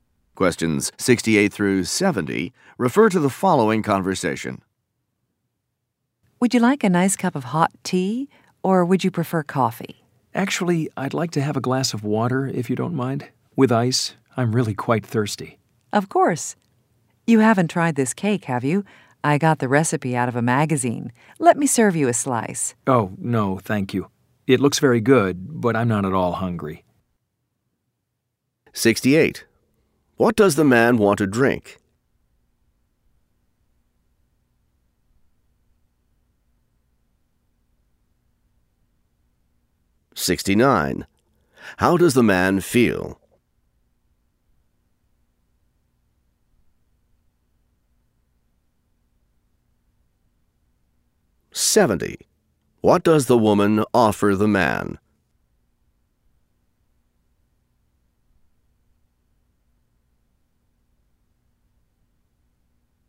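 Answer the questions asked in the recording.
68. A glass of water with ice
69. Thirsty
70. A slice of cake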